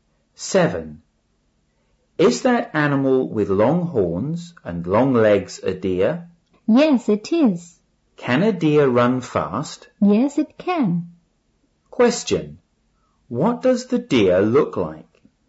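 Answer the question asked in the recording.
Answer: It has long horns and long legs.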